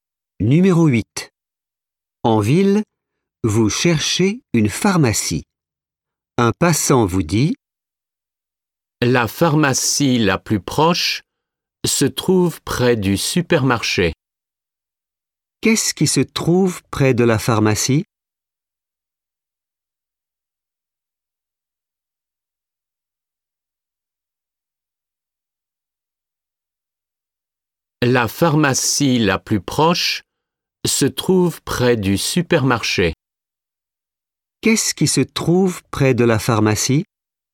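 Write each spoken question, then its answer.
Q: Qu'est-ce qui se trouve près de la pharmacie?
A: Le supermarché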